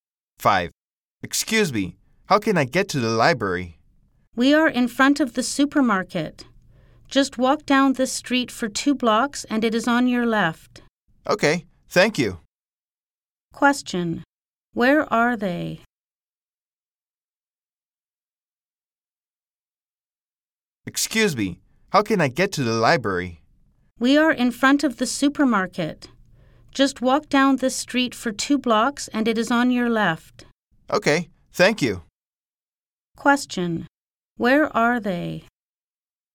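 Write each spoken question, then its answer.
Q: Question.Where are they?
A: In front of the supermarket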